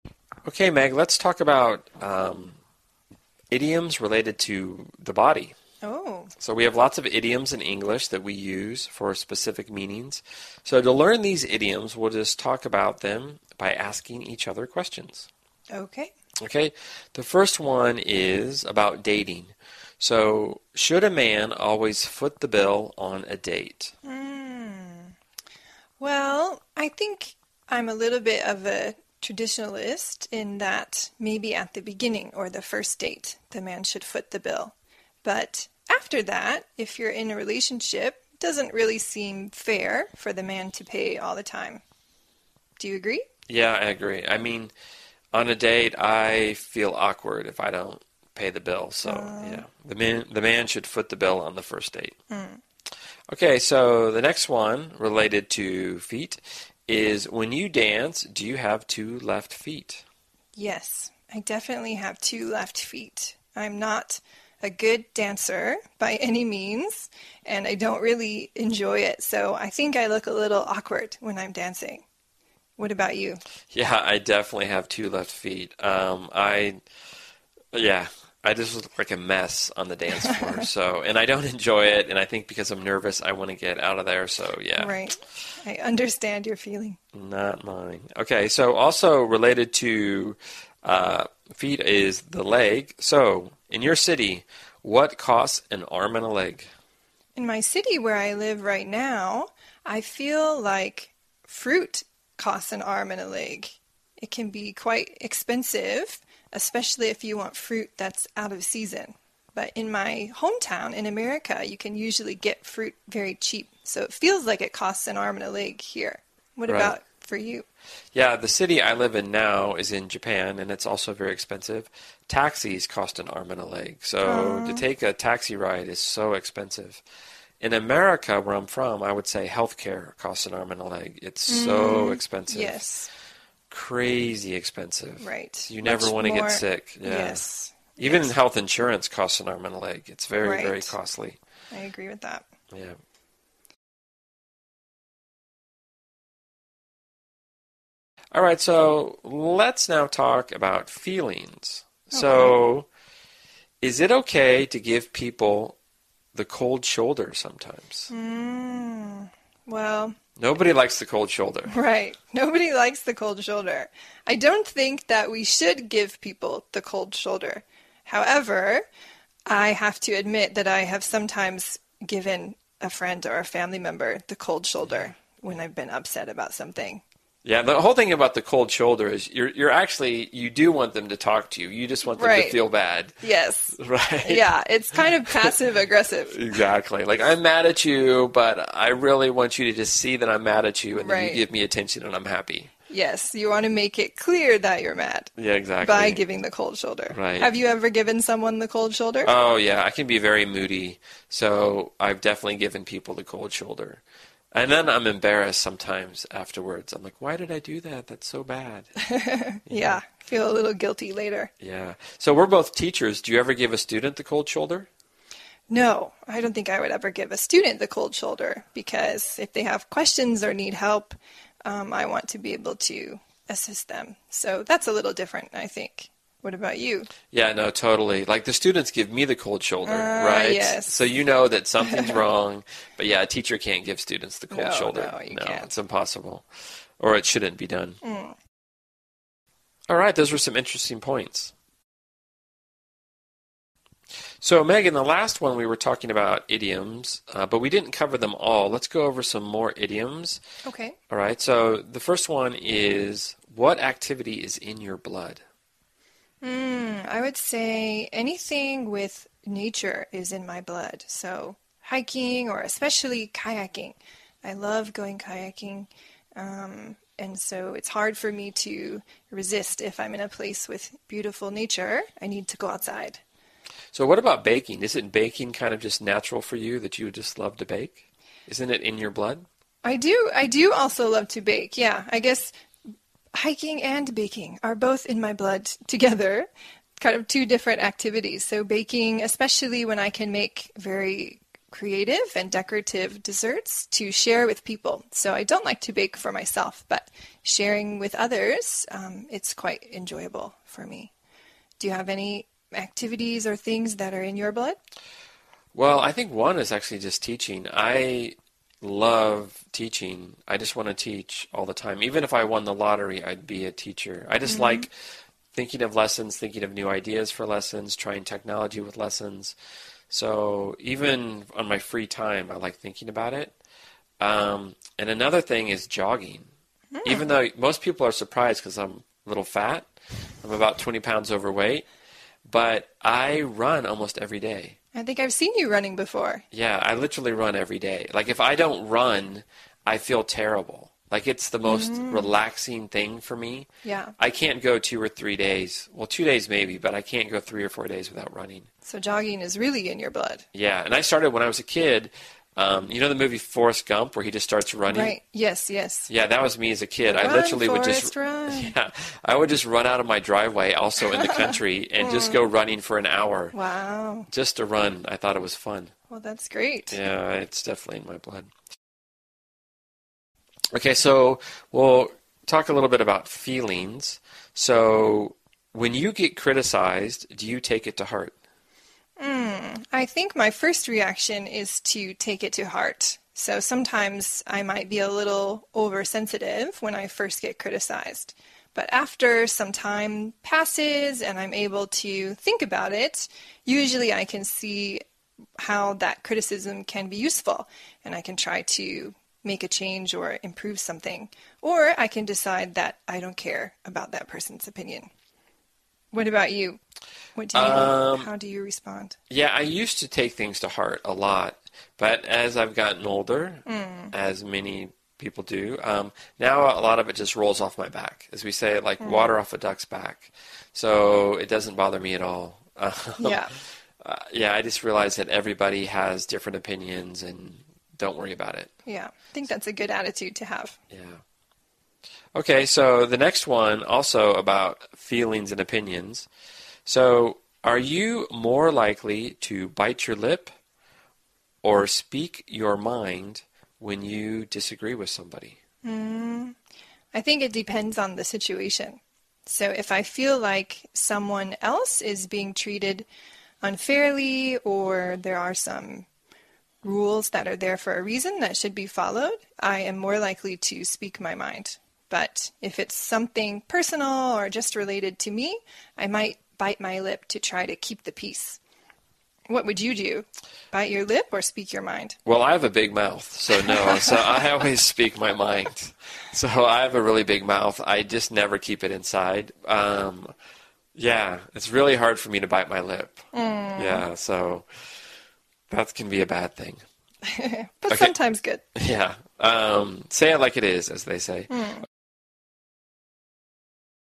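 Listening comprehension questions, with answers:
用 1-2 句话用自己的话回答下面的问题。点「✨ AI 判断」后,AI 会对照当天 transcript 给出参考要点与评分。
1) According to Meg, who should foot the bill on the first date, and what does she think about who should pay after that?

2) Meg says two specific things are "in her blood." What are they?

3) Todd mentions that he is about how many pounds overweight, and what does he say happens if he doesn't run for three or four days?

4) When asked about giving the cold shoulder, what reason does Meg give for why she would NOT give a student the cold shoulder?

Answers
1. The man should pay on the first date; after that, in a relationship, it isn't fair for the man to pay all the time.
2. Nature activities like hiking (and kayaking), and baking
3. About 20 pounds; he feels terrible and can't go three or four days without running.
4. If students have questions or need help, she wants to be able to help them.

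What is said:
OK, Meg, let's talk about idioms related to the body.
Meg
So we have lots of idioms in English that we use for specific meanings, so to learn these idioms, we'll just talk about them by asking each other questions.
Meg
OK, the first one is about dating, so should a man always foot the bill on a date?
Meg
Well, I think I'm a little bit of an traditionalist in that maybe at the beginning or the first date the man should foot the bill, but after that, if you're in a relationship, it doesn't really seem fair for the man to pay all the time. Do you agree?
Yeah, I agree, I mean on a date I feel awkward if I don't pay the bill, so yeah.
So the next one related to feet is when you dance, do you have two left feet?
Meg
Yes, I definitely have two left feet. I'm not a good dancer by any means and I don't really enjoy it so I think I look a little awkward when I'm dancing. What about you?
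Yeah, I just look like a mess on the dance floor, so and I don't enjoy it, and I think because I'm nervous I want to get out of there, so yeah.
Meg
Right. I understand your feeling.
Not my ... Alright so also related to feet is the leg, so in your city, what costs an arm and a leg?
Meg
In my city where I live right now, I feel like fruit costs an arm and a leg. It can be quite expensive, especially if you want fruit that's out of season, but in my hometown, in America, you can usually get fruit very cheap, so it feels like it costs an arm and a leg here. What about for you?
Yeah, the city I live in now is in Japan, and it's also very expensive. Taxis cost an arm and a leg, so to take a taxi ride is so expensive. In America where I'm from, I would say healthcare costs an arm and a leg. It's so expensive - crazy expensive.
Meg
Right, much more ...
You never want to get sick.
Meg
Yes.
I agree with that.
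Alright, let's now talk about feelings. So, is it OK to give people the cold shoulder sometimes?
Meg
Hmm, well ...
Nobody likes the cold shoulder.
Meg
Right, nobody likes the cold shoulder. I don't think we should give people the cold shoulder, however, I have to admit that I have sometimes given a friend or a family member the cold shoulder when I've been upset about something.
Yeah, the whole thing about the cold shoulder, is actually you do want them to talk to you. You just want them to feel bad.
Meg
Right. Yes.
Right?
Meg
Yeah, it's kind of passive aggressive.
Exactly, like I'm mad at you, but I really just want you to see that I'm mad at you and give me attention and I'm happy.
Meg
Right, yes, you want to make it clear that you're mad ...
Yeah, exactly
Meg
by giving the cold shoulder.
Right.
Meg
Have you ever given someone the cold shoulder?
Oh, yeah, I can be very moody, so I've definitely given people the cold shoulder. 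And then I'm embarrassed sometimes afterwards, like why did I do that? That's so bad.
Meg
Yeah, you feel a little guilty later.
Yeah, so we're both teachers. Do you ever give students the cold shoulder?
Meg
No, I don't think I would ever give a student the cold shoulder because if they have questions or need help, I want to be able to assist them, so that's a little different I think. What about you?
Yeah, no totally. Like the students give me the cold shoulder, right?
Meg
So you know that something's wrong, but yeah teachers can't give students the cold shoulder.
Meg
No, you can't.
It's impossible. Or it shouldn't be done.
Meg
Alright, those were some interesting points.
So Meg, in the last one we were talking about idioms, but we didn't cover them all. Let's go over some more idioms.
Meg
Alright so the first one is what activity is in your blood?
Meg
Hmm, I would say anything with nature in my blood, so hiking or especially kayaking. 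I love going kayaking, and so it's hard for me to resist if I'm in a place with beautiful nature, I need to go outside.
So what about baking? Isn't baking sort of just natural for you. Don't you just love to bake? Isn't it in your blood?
Meg
I do also love to bake. Yeah. I guess hiking and baking are both in my blood together, kind of two different activities. So baking especially when I can make very creative and decorative desserts, to share with people, so I don't like to bake for myself, but sharing with others, it's quite enjoyable for me. Do you have any activities or things that are in your blood?
Well, I think one is just teaching. I love teaching. I just want to teach all the time. Even if I won the lottery, I would be a teacher. I just like thinking of lessons, thinking of new ideas for lessons, trying technology with lessons, so even on my free time, I like thinking about it. 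And another thing is jogging. Even though, most people are surprised because I'm a little fat. I'm about 20 pounds overweight, but I run almost every day.
Meg
I think I've seen you running before.
Yeah, I literally run every day. Like if I don't run, I feel terrible, like it's the most relaxing thing for me.
Meg
Yeah.
I can't go two or three days - two days maybe - but I can't go three or four days without running.
Meg
So jogging is really in your blood?
Yeah, and I started when I was a kid. You know the movie Forest Gump, where he just starts running.
Meg
Right, yes, yes.
That was me as a kid.
Meg
Run Forest Run!
I would just run out of my driveway, also in the country, and just go running for an hour
Meg
Wow!
Just to run, I thought it was fun.
Meg
Well, that's great.
Yeah, it's definitely in my blood.
OK, so we'll talk a little about feelings. So when you get criticized, do you take it to heart?
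Meg
I think my first reaction, is to take it to heart, so sometimes I might be a little oversensitive when I first get criticized, but after some time passes and I'm able to think about it, usually I can see how that criticism can be useful, and I can try to make a change or improve something. Or I can decide that I don't care about that person's opinion. What about you? What do you do? How do you respond?
Yeah, I used to take things to heart a lot, but as I've gotten older, as many people do, now a lot of it just rolls off my back, as we say, like water off a duck's back, so it doesn't bother me at all
Meg
Yeah.
Yeah, I just realize everybody has different opinions and don't worry about it.
Meg
Yeah, I think that's a good attitude to have.
Yeah, OK, so the next one also about feelings and opinions. So are you more likely to bite your lip, or speak your mind when you disagree with somebody?
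Meg
I think it depends on the situation, so if I feel like someone else is being treated unfairly or there are some rules that are there for a reason that should be followed, I am ore likely to speak my mind, but if it's something personal, or just related to me I might bite my lip to try to keep the peace.
MegI think it depends on the situation, so if I feel like someone else is being treated unfairly or there are some rules that are there for a reason that should be followed, I am ore likely to speak my mind, but if it's something personal, or just related to me I might bite my lip to try to keep the peace.
ToddWell, I have a big mouth, so no, I always speak my mind. So I have a really big mouth. I just never keep it inside. Yeah, it's really hard for me to bite my lip.
ToddYeah, so. That can be a bad thing.
MegBut sometimes good.
ToddYeah, say it like it is, as they say.

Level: CEFRB2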